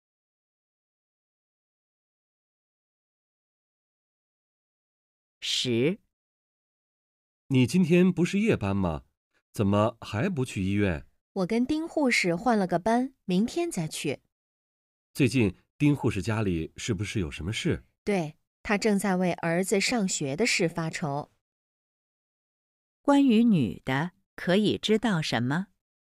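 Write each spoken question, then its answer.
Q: 关于女的,可以知道什么?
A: 她是护士,和丁护士换了班,明天再去上班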